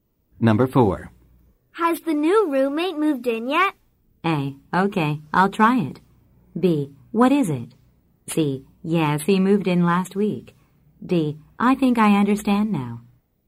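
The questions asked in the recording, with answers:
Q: Has the new roommate moved in yet?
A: C: Yes, he moved in last week.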